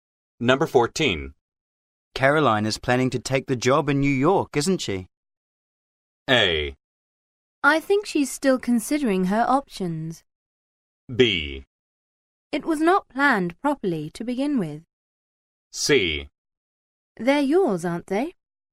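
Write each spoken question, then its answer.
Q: Caroline is planning to take the job in New York, isn't she?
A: A: I think she's still considering her options.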